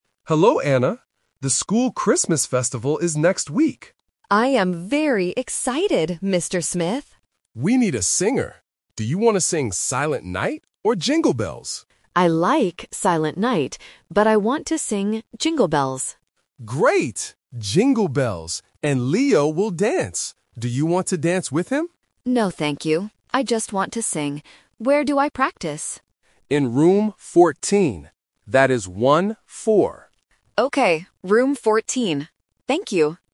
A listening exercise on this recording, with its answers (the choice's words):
Listen to the conversation and choose the correct answer (A, B, or C).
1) What song will Anna sing?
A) Jingle Bells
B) Silent Night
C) Happy Birthday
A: Jingle Bells

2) What will Leo do at the festival?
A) He will sing.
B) He will play the piano.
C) He will dance.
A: He will dance.

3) Where will Anna practice?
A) Room 4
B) Room 14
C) Room 40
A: Room 14

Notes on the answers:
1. Anna clearly says, "I want to sing Jingle Bells." Mr. Smith also repeats it: "Great! Jingle Bells."
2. Mr. Smith says, "And Leo will dance."
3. Mr. Smith tells Anna to practice in "Room 14" and makes it very clear by saying "one-four". Anna repeats "Room 14".